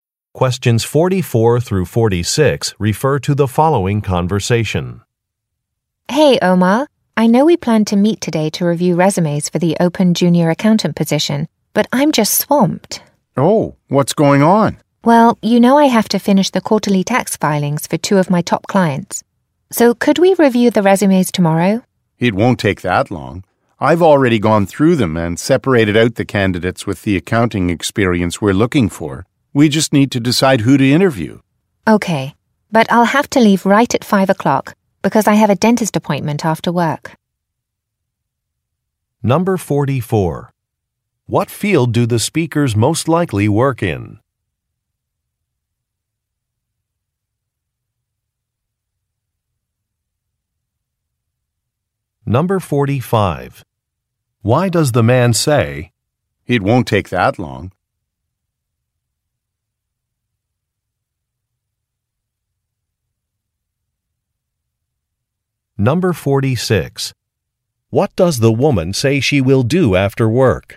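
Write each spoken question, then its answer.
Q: What field do the speakers most likely work in?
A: Accounting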